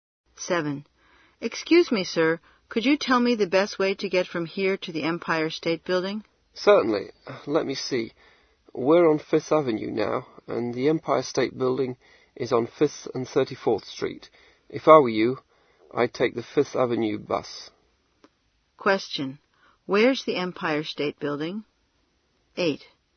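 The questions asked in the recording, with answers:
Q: Where's the Empire State Building?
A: On 5th Avenue and 34th Street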